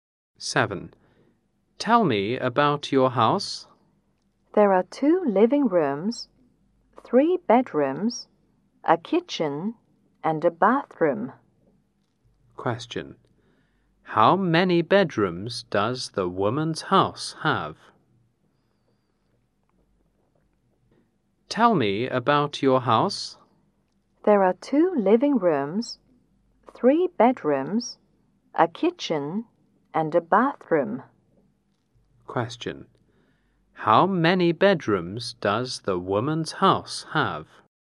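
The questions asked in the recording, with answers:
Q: How many bedrooms does the woman's house have?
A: Three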